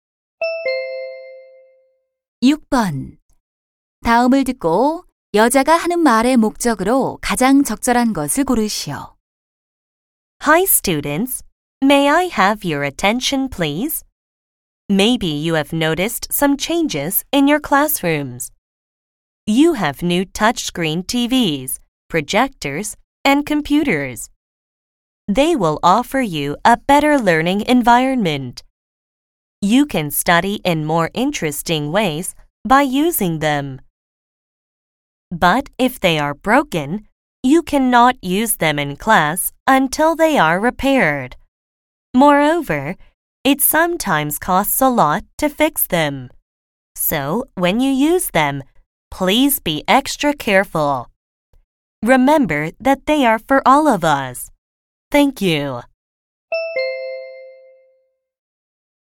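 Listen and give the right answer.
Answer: 새 교실 기자재를 조심해서 사용할 것을 당부하려고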